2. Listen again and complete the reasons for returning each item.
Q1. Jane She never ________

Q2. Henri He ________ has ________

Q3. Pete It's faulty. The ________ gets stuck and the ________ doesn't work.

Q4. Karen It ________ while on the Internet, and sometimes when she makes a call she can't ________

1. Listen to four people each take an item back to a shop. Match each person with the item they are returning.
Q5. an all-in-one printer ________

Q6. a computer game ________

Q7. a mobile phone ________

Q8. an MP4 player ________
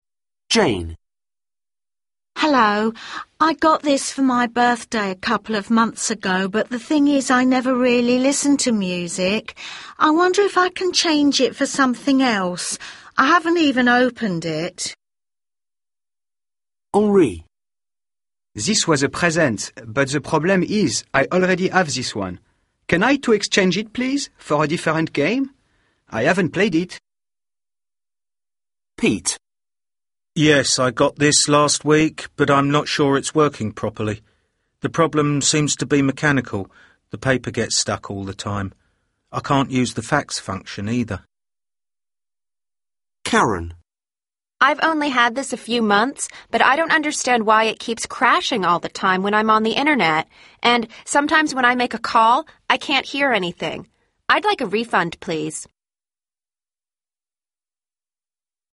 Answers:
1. listen to music
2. already has thisone
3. paper gets stuck and the fax
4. crashes
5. Pete
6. Henri
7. Karen
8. Jane

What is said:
Jane: Hello, I got this for birthday a couple of months ago but the thing is I never really listen to music. I wonder if I can change it for something else? I haven't even opened it.
Henri: This was a present but the problem is I already have this one. Can I to exchange it, please, for a different game? I haven't played it.
Pete: Yes, I got this last week but I'm not sure it's working properly. The problem seems to be mechanical – the paper gets stuck all the time. I can't use the fax function, either.
Karen: I've only had this a few months but I don't understand why it keeps crashing all the time when I'm on the Internet, and sometimes when I make a call I can't hear anything. I'd like a refund please.